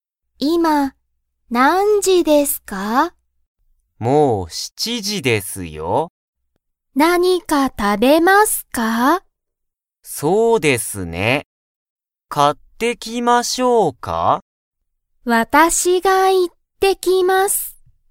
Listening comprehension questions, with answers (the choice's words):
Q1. 佐藤(さとう)さんが買(か)いに行(い)きますか?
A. はい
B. いいえ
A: いいえ